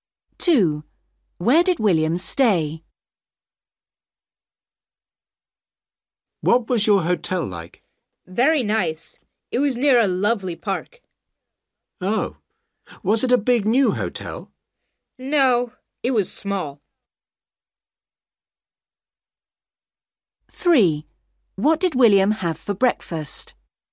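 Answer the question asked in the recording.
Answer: In a small hotel near a park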